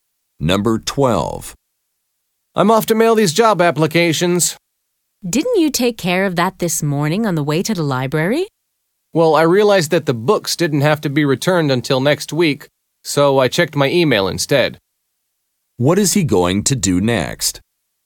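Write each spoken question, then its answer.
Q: What is he going to do next?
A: Mail the job applications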